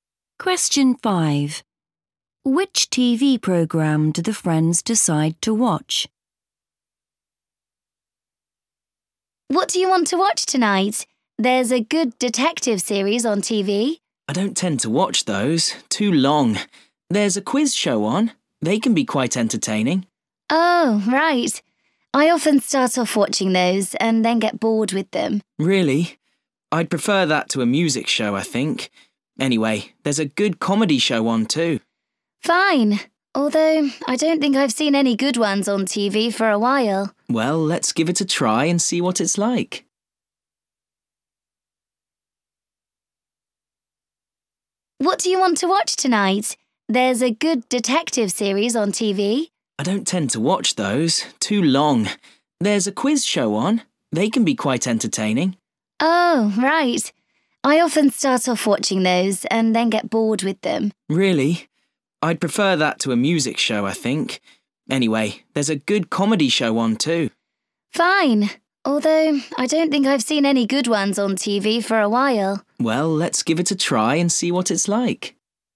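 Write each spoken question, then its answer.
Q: Which TV program do the friends decide to watch?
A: a comedy show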